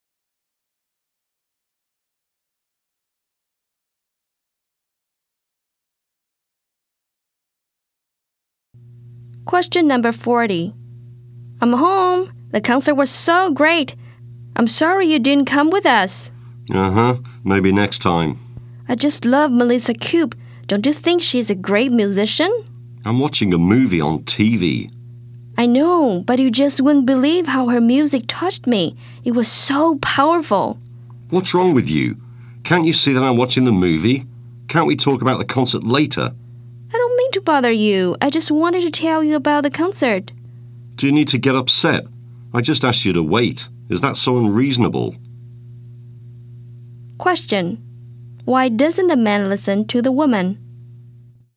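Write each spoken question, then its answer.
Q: Why doesn't the man listen to the woman?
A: Because he's watching a movie on TV.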